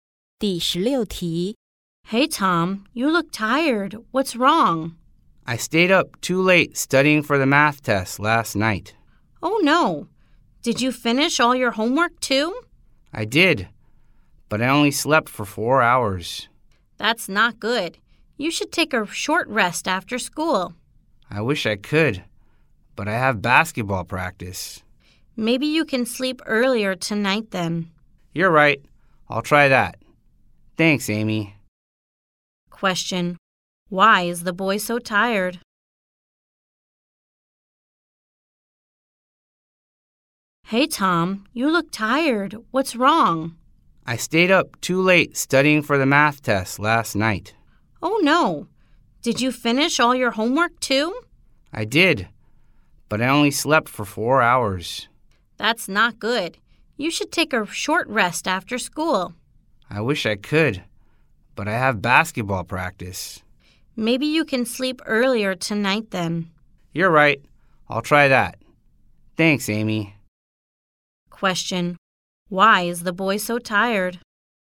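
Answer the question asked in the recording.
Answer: He stayed up late studying for the math test and only slept 4 hours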